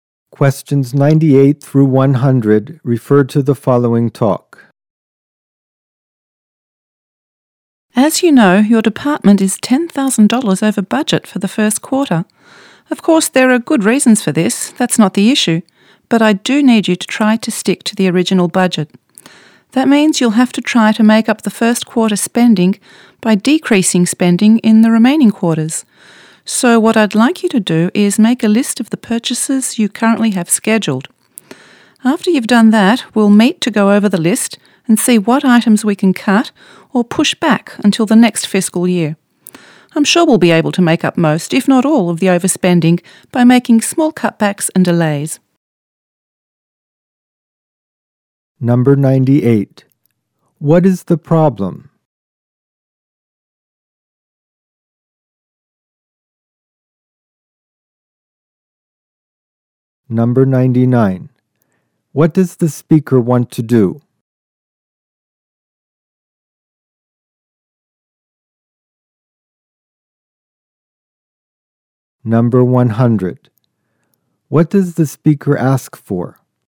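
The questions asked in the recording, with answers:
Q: What is the problem?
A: The department is $10,000 over budget

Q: What does the speaker ask for?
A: A list of scheduled purchases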